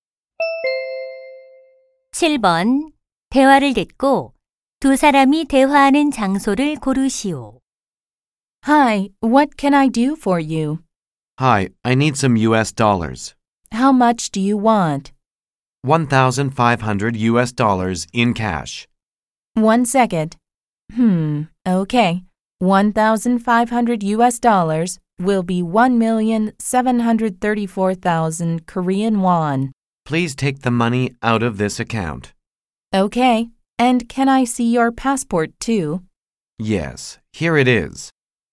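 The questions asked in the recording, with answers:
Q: 대화를 듣고 두 사람이 대화하는 장소를 고르시오.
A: 은행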